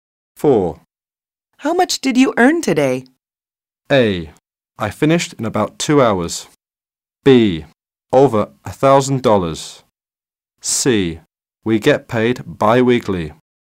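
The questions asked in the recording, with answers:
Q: How much did you earn today?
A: B: Over $1,000.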